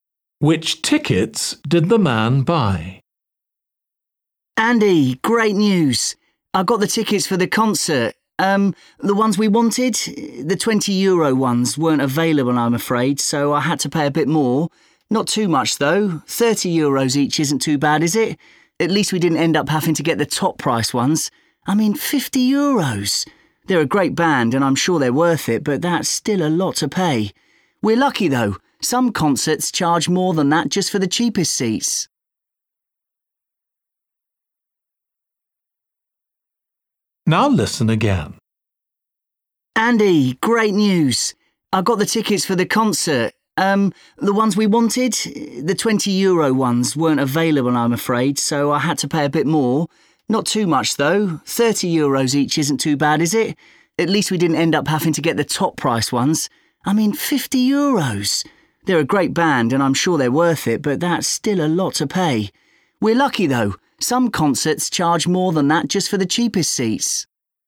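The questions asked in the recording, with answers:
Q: Which tickets did the man buy?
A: the €30 tickets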